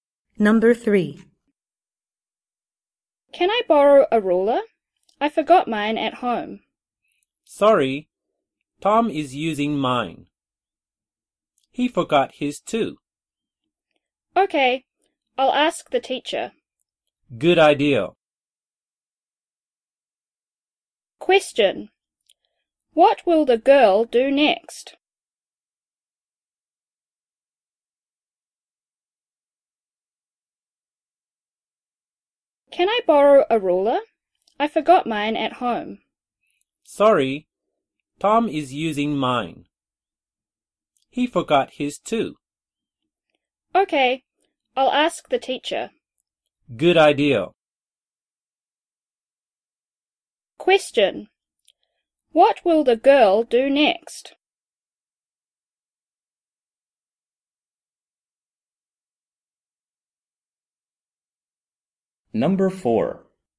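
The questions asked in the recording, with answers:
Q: What will the girl do next?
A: Ask the teacher for a ruler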